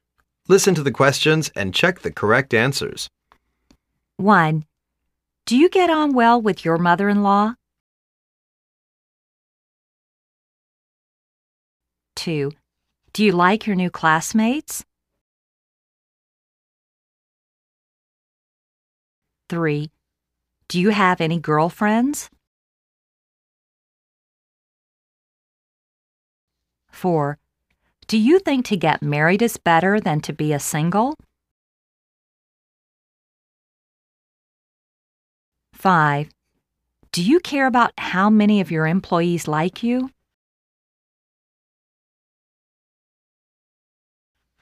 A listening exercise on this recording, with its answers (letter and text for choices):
Listen to the questions and check the correct answers.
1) Do you get on well with your mother-in-law?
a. Yes. Why not?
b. Yes. She's well.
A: a. Yes. Why not?

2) Do you like your new classmates?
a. No. l'm not new.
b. No. Things they talk are really boring.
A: b. No. Things they talk are really boring.

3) Do you have any girlfriends?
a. Yes. l'm dating a girl from the dance club.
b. Yes. My girlfriend has no money.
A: a. Yes. l'm dating a girl from the dance club.

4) Do you think to get married is better than to be a single?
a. No. Single is better.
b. No. Get married is better.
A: a. No. Single is better.

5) Do you care about how many of your employees like you?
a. I don't like.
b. lt's doesn't matter.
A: b. lt's doesn't matter.